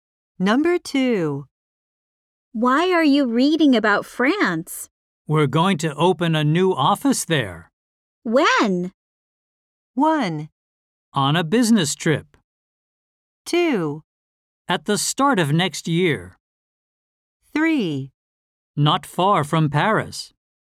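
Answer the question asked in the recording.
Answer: 2: At the start of next year.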